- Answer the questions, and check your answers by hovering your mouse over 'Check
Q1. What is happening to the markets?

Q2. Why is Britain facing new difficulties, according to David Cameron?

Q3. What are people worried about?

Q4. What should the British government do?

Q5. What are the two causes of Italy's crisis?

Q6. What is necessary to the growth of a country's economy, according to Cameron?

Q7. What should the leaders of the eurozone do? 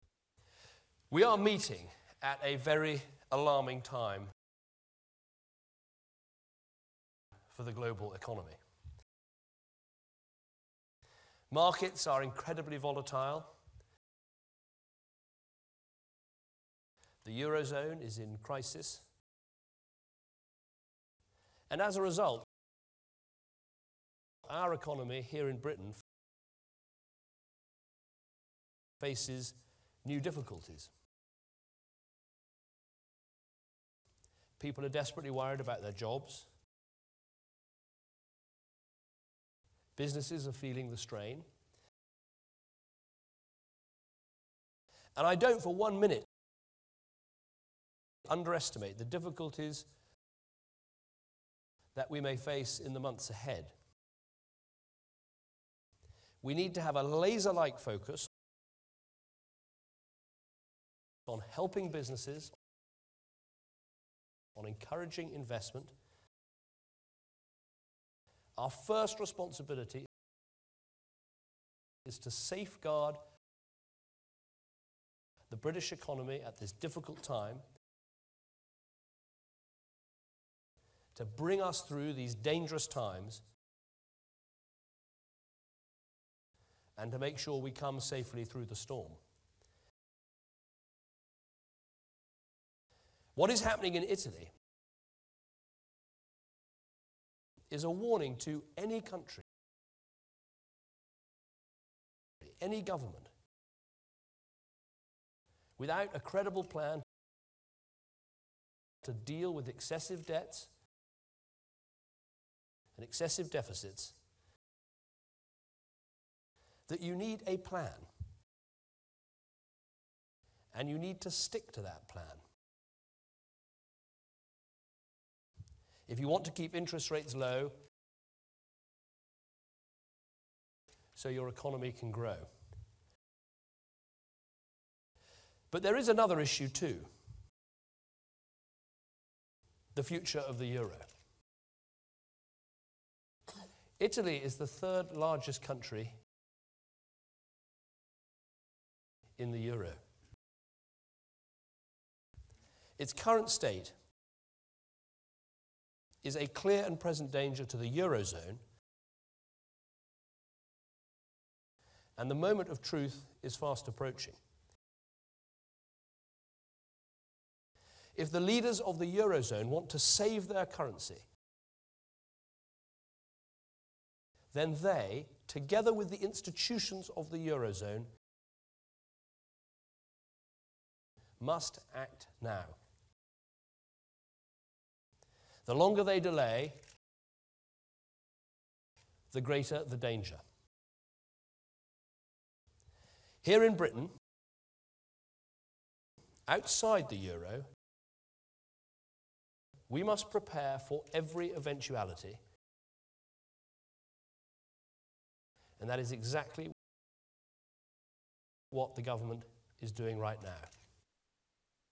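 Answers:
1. They are incredibly volatile.
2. Because the eurozone is in crisis.
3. Their jobs.
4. Focus on helping businesses and encouraging investment, and safeguard the British economy.
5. Excessive debts and excessive deficits.
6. A credible plan, stuck to, to keep interest rates low.
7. Act now, together with the eurozone institutions, to save their currency.

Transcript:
EUROZONE
We are meeting at a very alarming
time
for the global (1) economy.
Markets are incredibly
volatile,
the eurozone is in crisis,
and as a result,
our economy, here in Britain,
faces new difficulties.
People are desperately
worried
about their jobs,
businesses
are feeling the strain (2)
and I don't, for one minute,
that we may face in the months ahead (3).
We need to have a laser-like focus
on helping businesses,
on encouraging investment;
our first responsibility
is to safeguard
the British economy at this difficult time,
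to bring us through these dangerous
times,
and to make sure we come safely through the storm (5).
What is happening in Italy
is a warning to any country,
any government
without a credible
plan
to deal with excessive
debts
and excessive deficits.
Then you need a plan,
and you need to stick to (6) that plan,
if you want to keep interests
rates (7) low,
so your economy can grow.
But there is another issue too:
the future of the
euro.
Italy is
the third largest country
in the euro.
Its current state (8)
is a clear and present danger to the eurozone,
and the moment of truth is fast approaching.
If the leaders of the eurozone
want to save their currency
then they, together
with the institutions of the eurozone,
must act now.
The longer they delay (10),
the greater the danger.
Here in Britain,
outside the euro,
we must prepare for every eventuality (11).
And that is exactly
what the government is doing right now.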